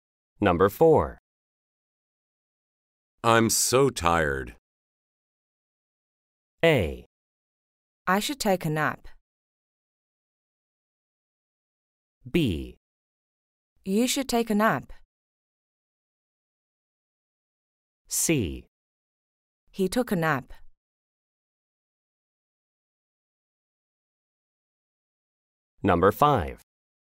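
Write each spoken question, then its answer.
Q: I'm so tired.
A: B: You should take a nap.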